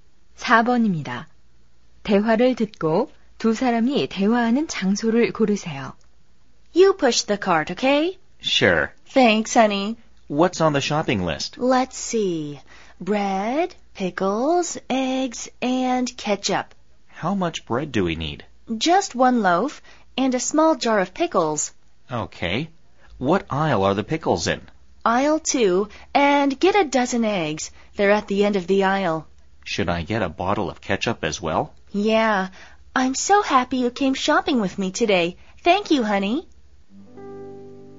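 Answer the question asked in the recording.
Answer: 슈퍼마켓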